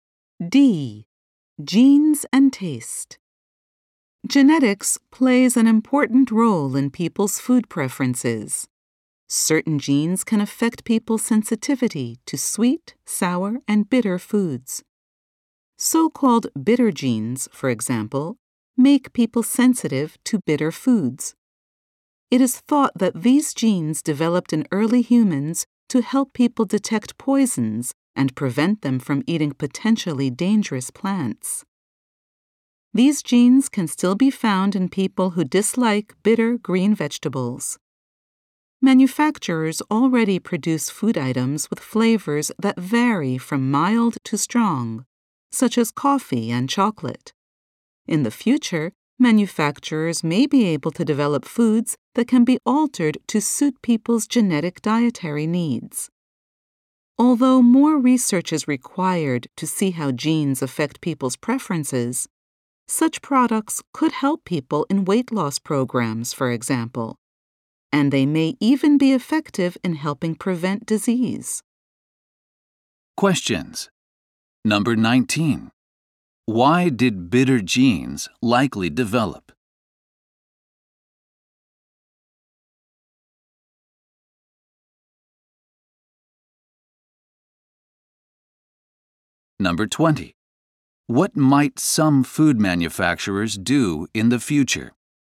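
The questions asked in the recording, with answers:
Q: Why did bitter genes likely develop?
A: To help people detect poisons and avoid dangerous plants

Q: What might some food manufacturers do in the future?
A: Develop foods that can be altered to suit people's genetic dietary needs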